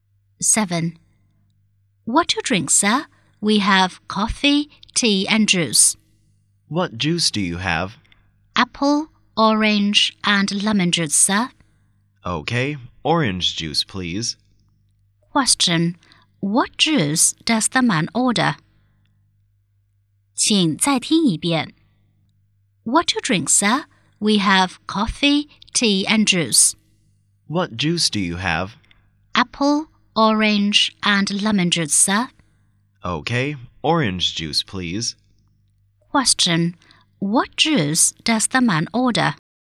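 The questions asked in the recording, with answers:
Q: What juice does the man order?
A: Orange juice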